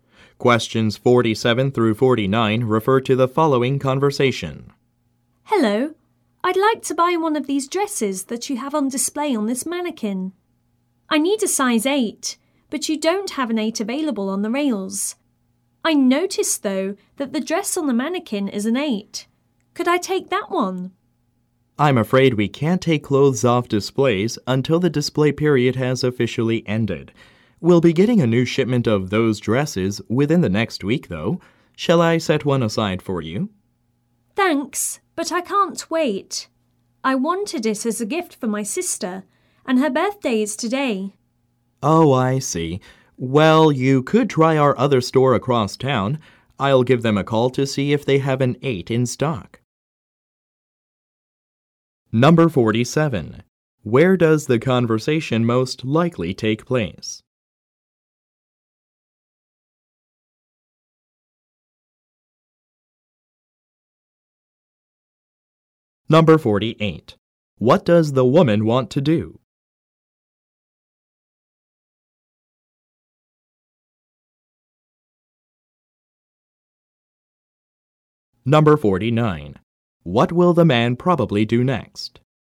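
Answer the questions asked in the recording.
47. In a clothing store
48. Buy the size 8 dress from the mannequin display
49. Call the other store to check if they have a size 8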